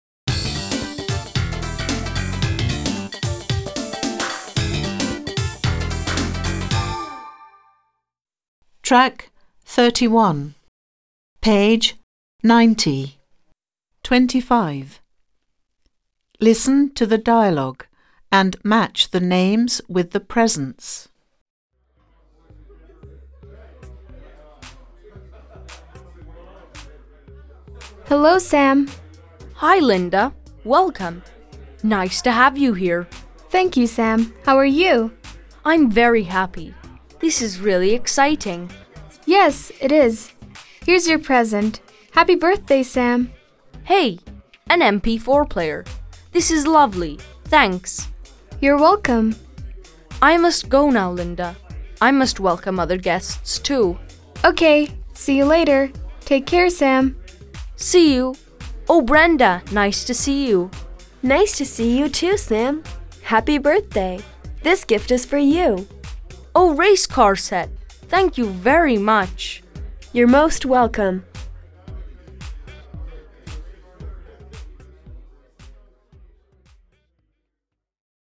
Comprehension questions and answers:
Answer the questions.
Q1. Why does Sam leave Linda?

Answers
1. He must welcome other guests.

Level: 5. Sınıf